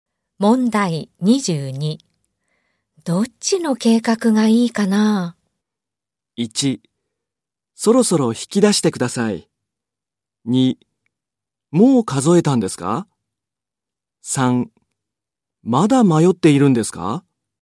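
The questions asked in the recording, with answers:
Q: どっちの計画がいいかな?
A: 3: まだ迷っているんですか?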